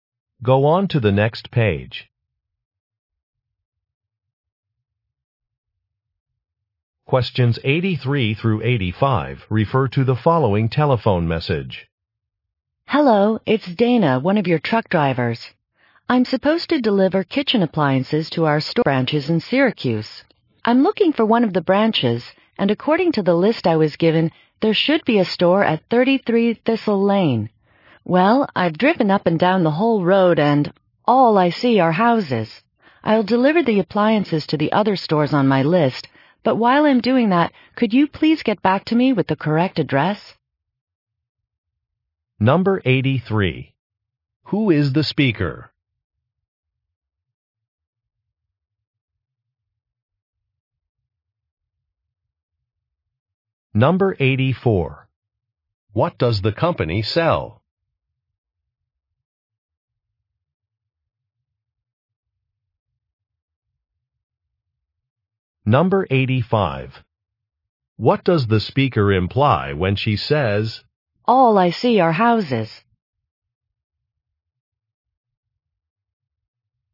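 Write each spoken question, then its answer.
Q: Who is the speaker?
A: A truck driver

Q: What does the company sell?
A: Kitchen appliances

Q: What does the speaker imply when she says,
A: She cannot find the store at that address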